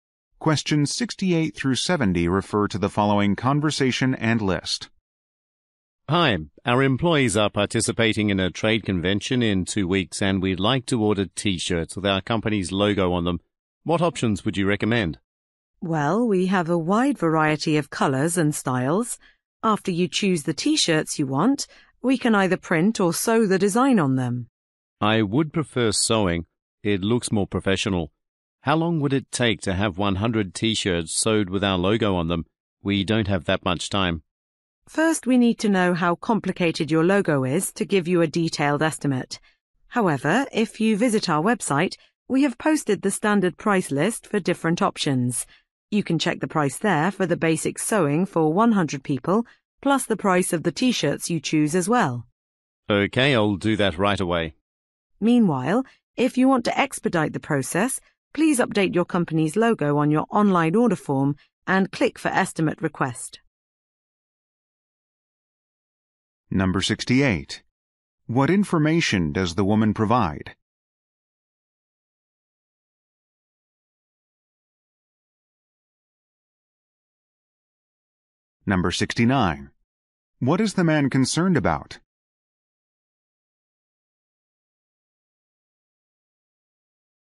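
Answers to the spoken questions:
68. A standard price list is posted on the website
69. How long the order will take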